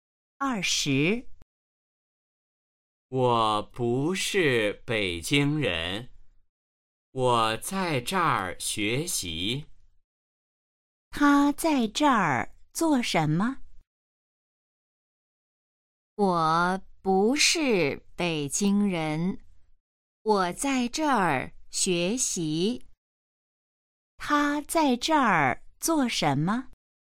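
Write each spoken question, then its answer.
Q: 他在这儿做什么?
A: 学习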